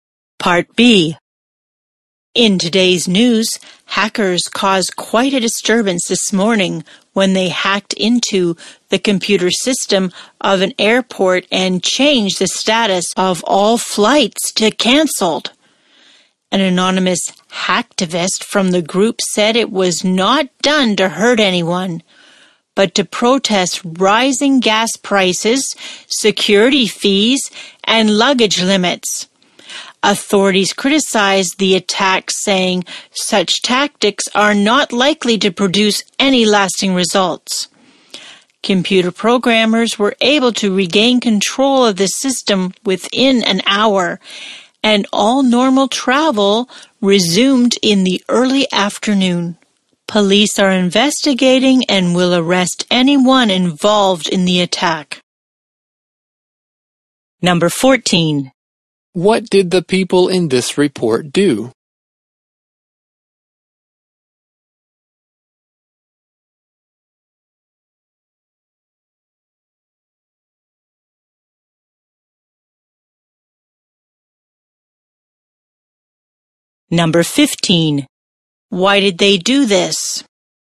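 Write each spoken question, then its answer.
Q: What did the people in this report do?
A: They hacked an airport computer system and changed all flights to canceled

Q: Why did they do this?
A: To protest rising gas prices, security fees and luggage limits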